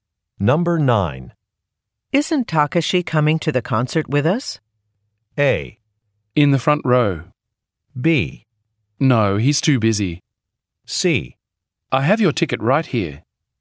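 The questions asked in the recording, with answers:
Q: Isn't Takashi coming to the concert with us?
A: B: No, he's too busy.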